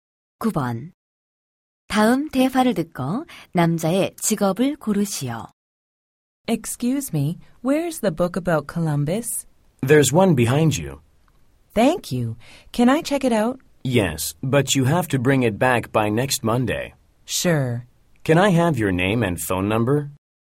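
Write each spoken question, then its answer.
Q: 다음 대화를 듣고 남자의 직업을 고르시오.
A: 도서관 사서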